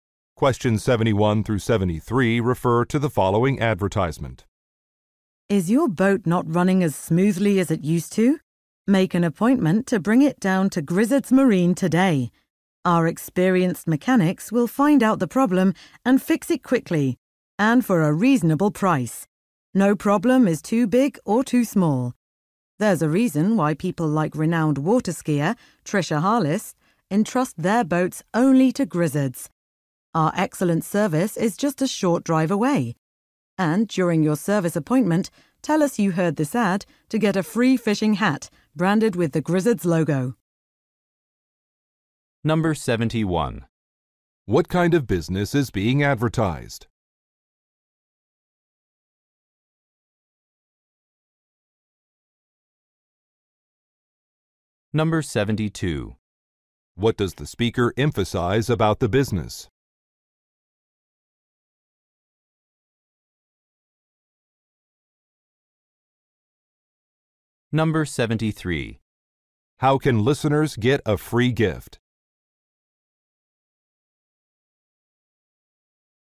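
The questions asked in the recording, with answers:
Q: What kind of business is being advertised?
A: A boat repair shop

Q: How can listeners get a free gift?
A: By saying they heard the ad during their service appointment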